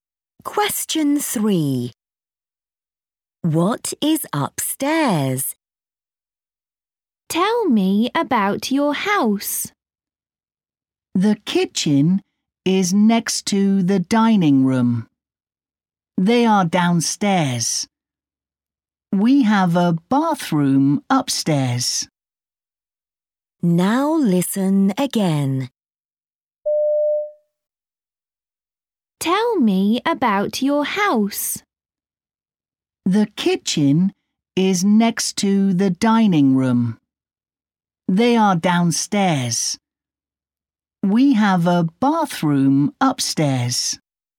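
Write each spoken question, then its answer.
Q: What is upstairs?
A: A bathroom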